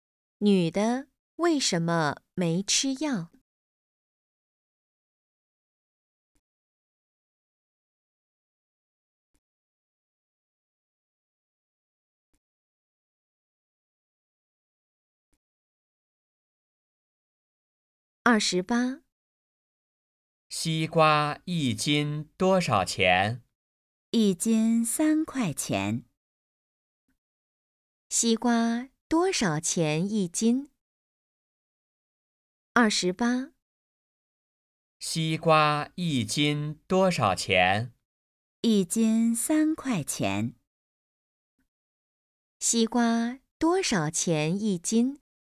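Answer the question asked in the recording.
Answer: 三块钱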